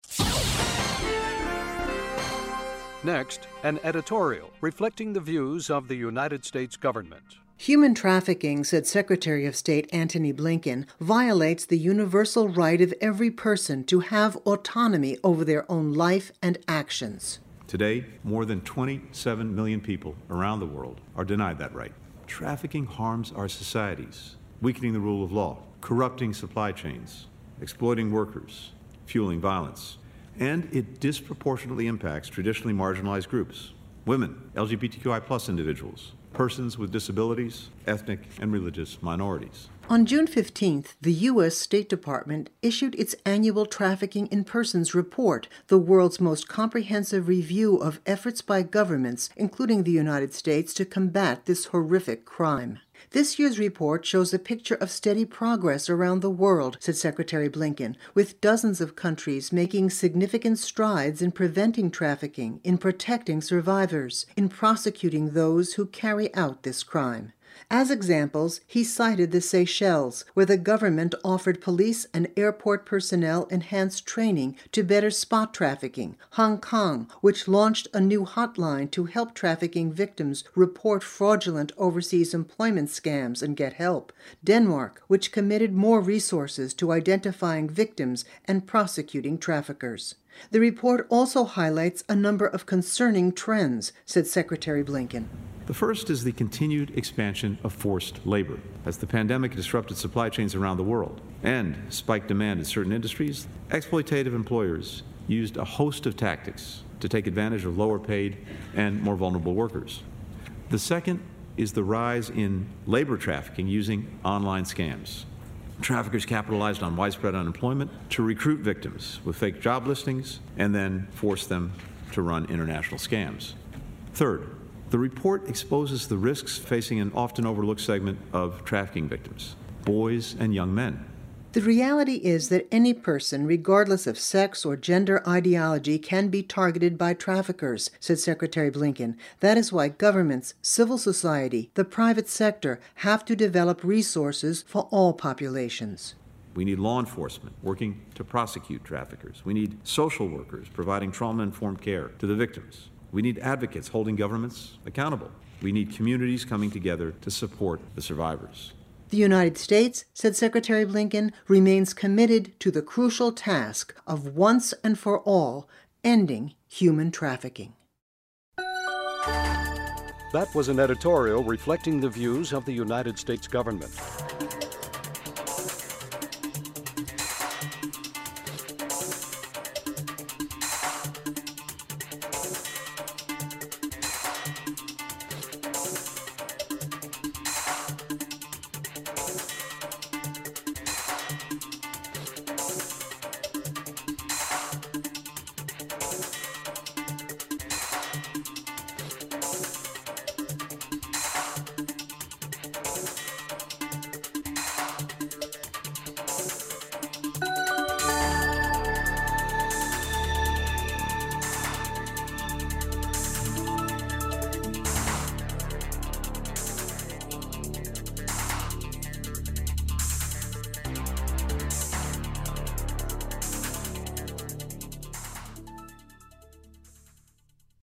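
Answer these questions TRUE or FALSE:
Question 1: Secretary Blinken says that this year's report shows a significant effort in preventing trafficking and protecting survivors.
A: TRUE

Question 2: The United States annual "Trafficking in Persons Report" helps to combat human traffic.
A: TRUE

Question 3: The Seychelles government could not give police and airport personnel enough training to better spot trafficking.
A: FALSE

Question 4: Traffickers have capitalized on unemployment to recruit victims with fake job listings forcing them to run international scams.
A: TRUE

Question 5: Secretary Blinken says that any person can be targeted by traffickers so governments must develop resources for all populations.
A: TRUE

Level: Intermediate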